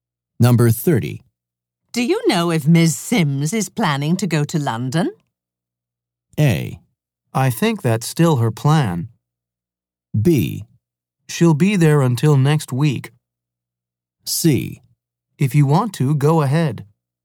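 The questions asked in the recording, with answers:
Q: Do you know if Ms. Sims is planning to go to London?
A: A: I think that's still her plan.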